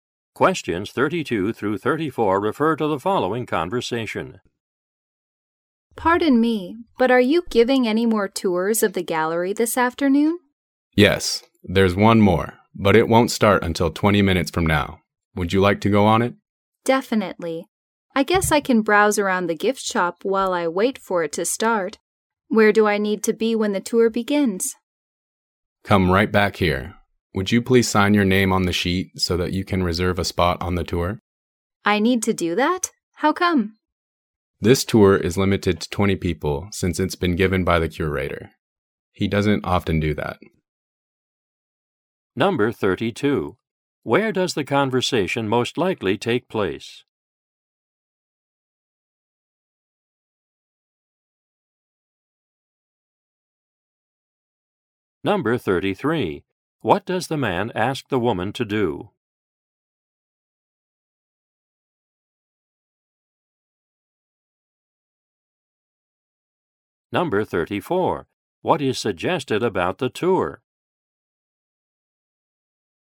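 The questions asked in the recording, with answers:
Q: Where does the conversation most likely take place?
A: At a gallery

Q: What does the man ask the woman to do?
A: Sign her name on the sheet to reserve a spot

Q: What is suggested about the tour?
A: It is limited to 20 people because the curator gives it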